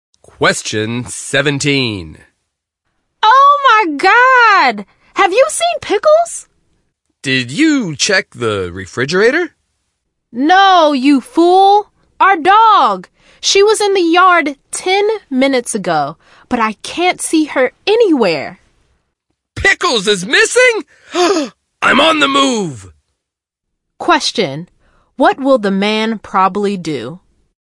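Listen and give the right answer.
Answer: Go look for their missing dog, Pickles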